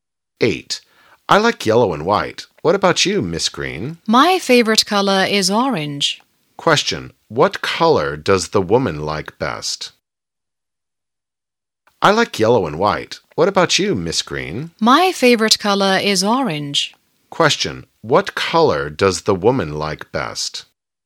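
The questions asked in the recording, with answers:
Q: Question. What color does the woman like best?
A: Orange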